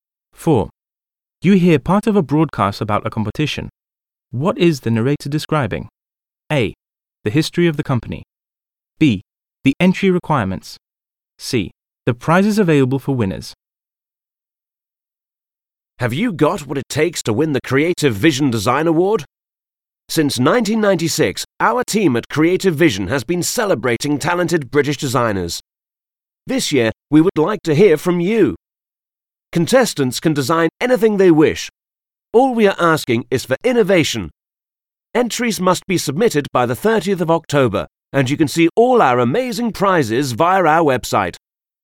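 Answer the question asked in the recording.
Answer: B: The entry requirements.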